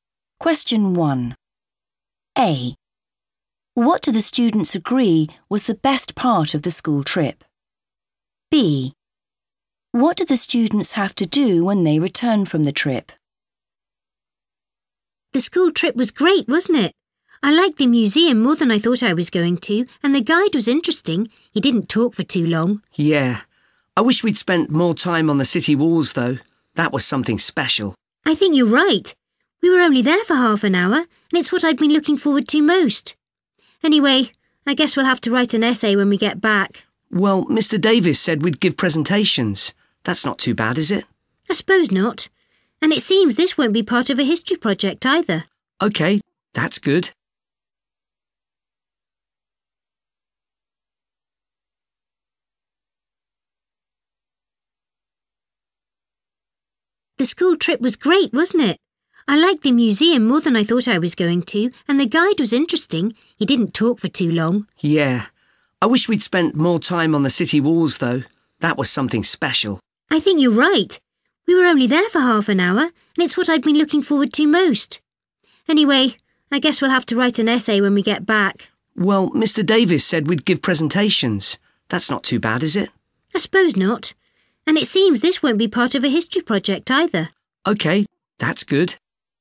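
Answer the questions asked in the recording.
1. the city walls
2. give presentations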